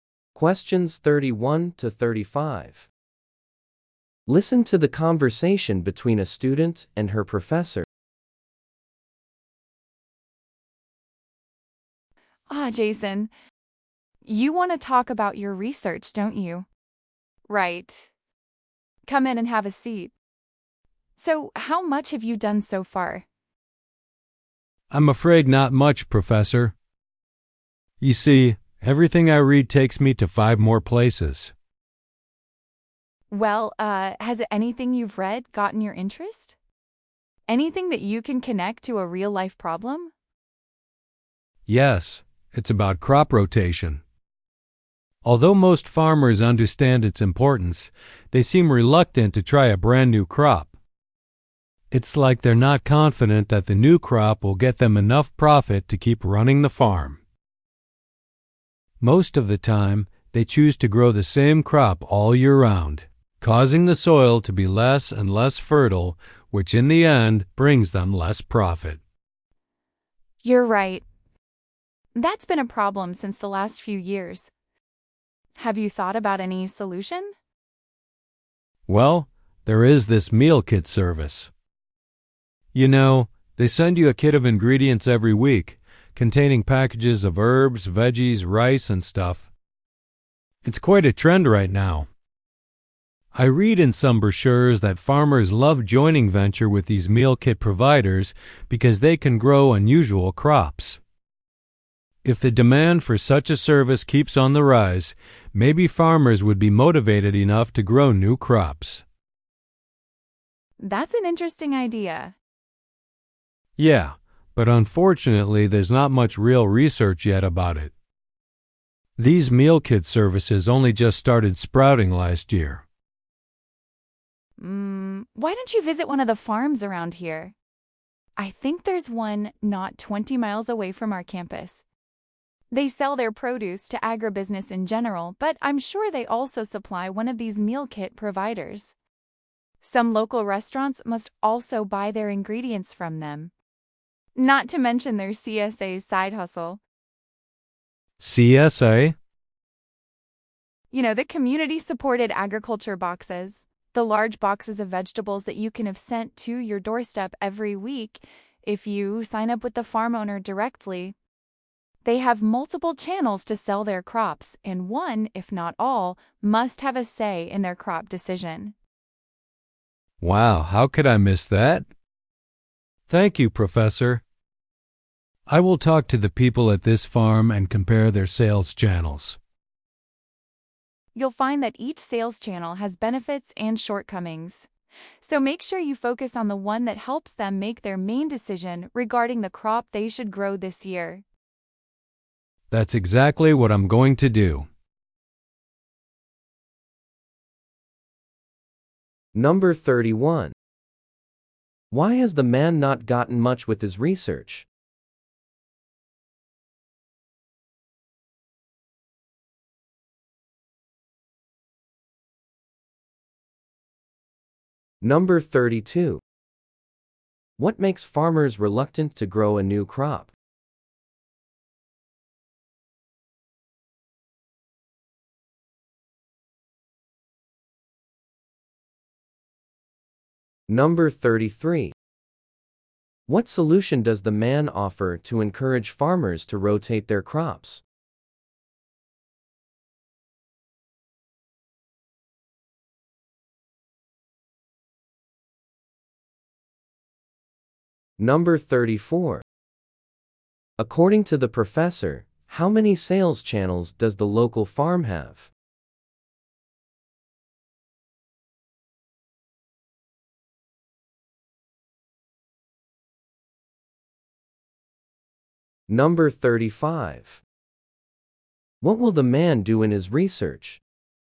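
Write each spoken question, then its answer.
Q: Why has the man not gotten much with his research?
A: Everything he reads leads him to more sources.

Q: What makes farmers reluctant to grow a new crop?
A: They are not confident it will make enough profit.

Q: What solution does the man offer to encourage farmers to rotate their crops?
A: Working with meal kit services.

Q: What will the man do in his research?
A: Talk to the people at the farm and compare their sales channels.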